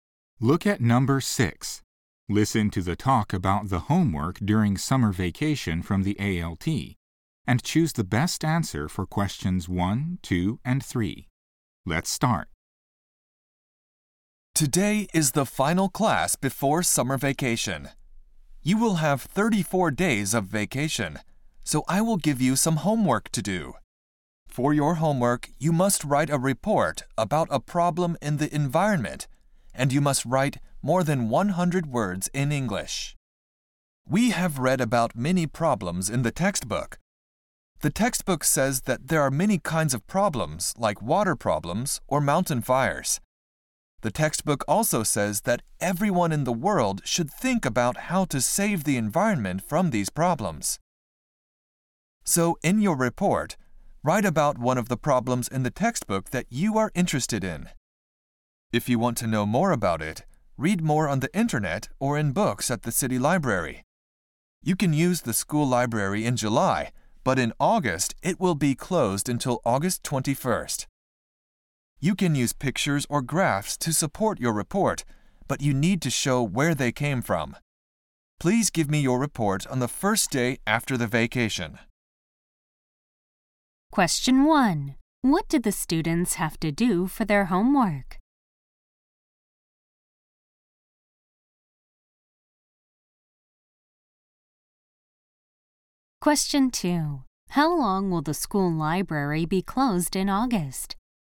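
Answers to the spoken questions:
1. Write a report of more than 100 words in English about an environmental problem from the textbook
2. Until August 21st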